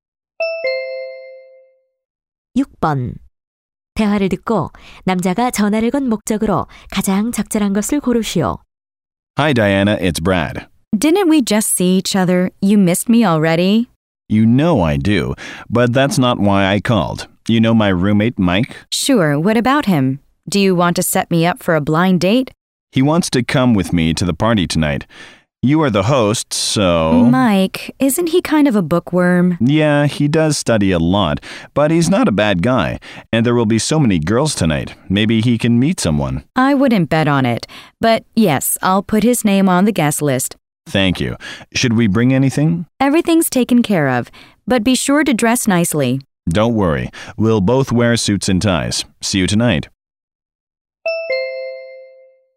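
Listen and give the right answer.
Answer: 룸메이트 마이크를 오늘 밤 파티에 데려가도 되는지 부탁하려고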